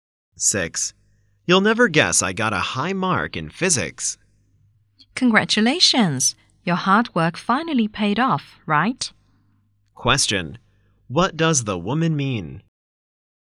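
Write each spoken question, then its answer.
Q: What does the woman mean?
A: The man's hard work has been rewarded.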